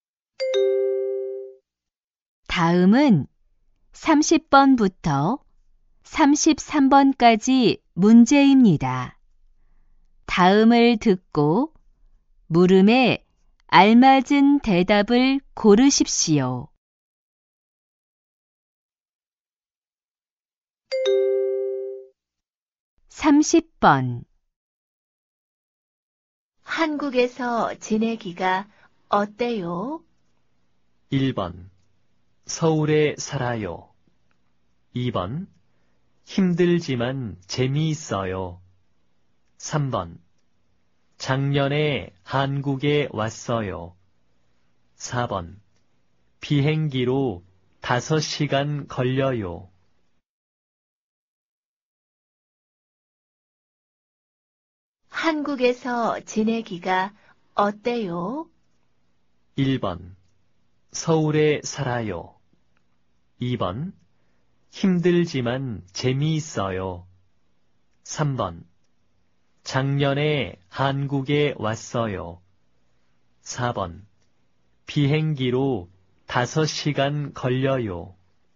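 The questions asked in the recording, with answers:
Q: 한국에서 지내기가 어때요?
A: 2: 힘들지만 재미있어요.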